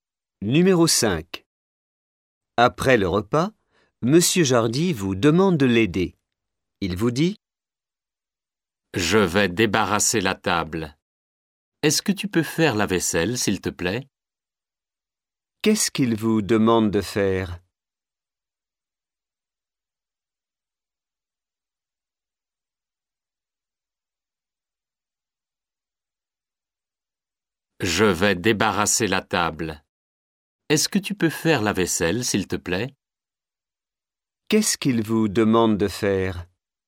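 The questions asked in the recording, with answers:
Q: Qu'est-ce qu'il vous demande de faire ?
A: La vaisselle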